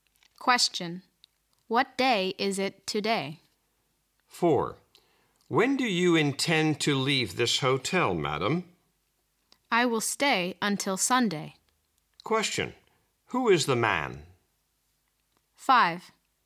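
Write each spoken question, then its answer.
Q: Who is the man?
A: A hotel receptionist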